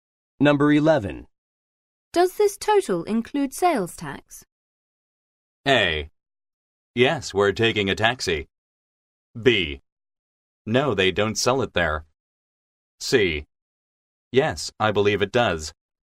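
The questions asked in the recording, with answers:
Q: Does this total include sales tax?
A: C: Yes, I believe it does.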